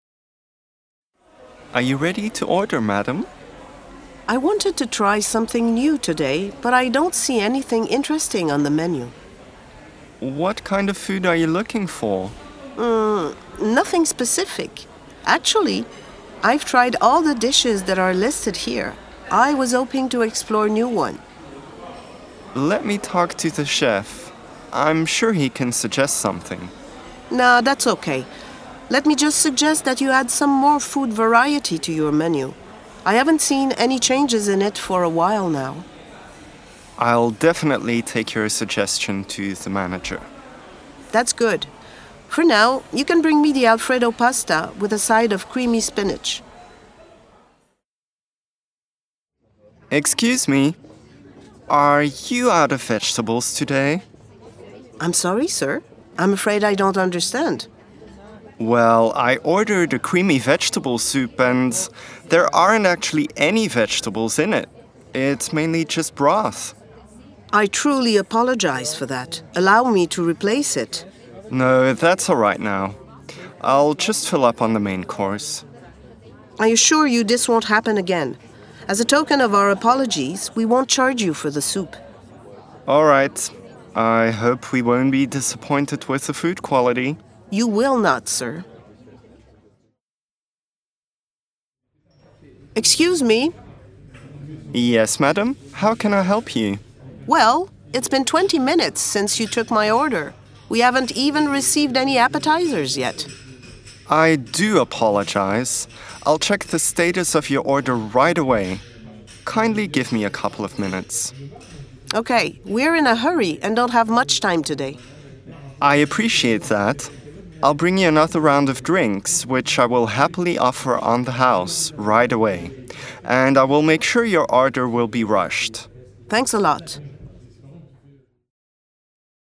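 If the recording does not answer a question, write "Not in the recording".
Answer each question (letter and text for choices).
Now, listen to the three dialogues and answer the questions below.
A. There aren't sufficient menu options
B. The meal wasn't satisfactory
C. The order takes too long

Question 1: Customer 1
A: A. There aren't sufficient menu options

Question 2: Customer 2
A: B. The meal wasn't satisfactory

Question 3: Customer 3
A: C. The order takes too long

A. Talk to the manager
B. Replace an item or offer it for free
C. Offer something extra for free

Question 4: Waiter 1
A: A. Talk to the manager

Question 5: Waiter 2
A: B. Replace an item or offer it for free

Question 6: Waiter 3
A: C. Offer something extra for free

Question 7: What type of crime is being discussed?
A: Not in the recording

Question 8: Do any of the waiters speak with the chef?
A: No, none of them does.

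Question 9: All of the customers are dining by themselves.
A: False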